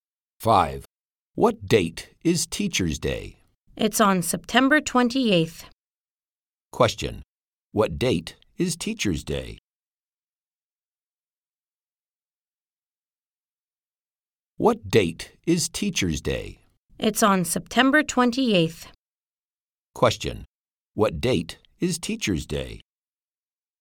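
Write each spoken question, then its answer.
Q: Question, what date is Teacher's Day?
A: September 28th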